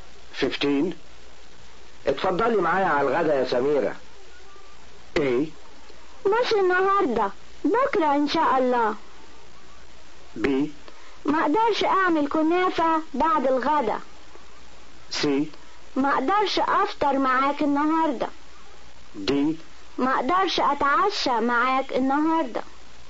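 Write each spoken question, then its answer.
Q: اتفضلي معايا على الغدا يا سميرة.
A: A: مش النهاردة، بكرة ان شاء الله.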